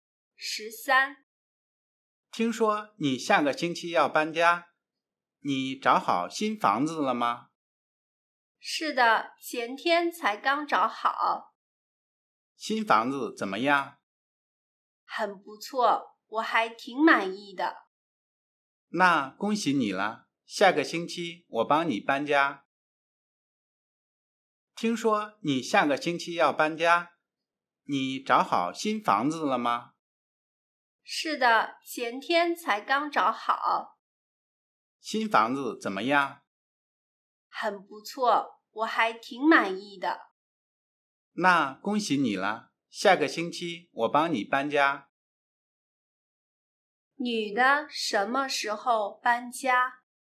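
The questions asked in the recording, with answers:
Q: 女的什么时候搬家?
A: 下个星期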